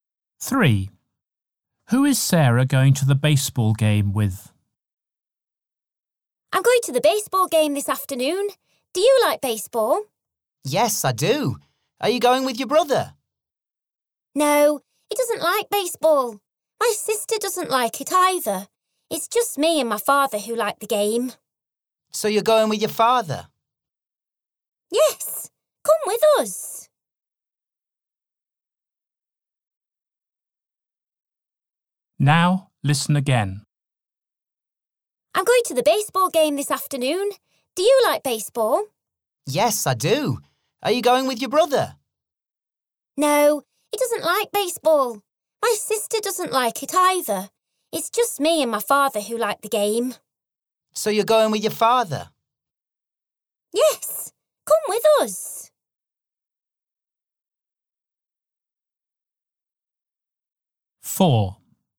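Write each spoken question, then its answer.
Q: Who is Sarah going to the baseball game with?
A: Her father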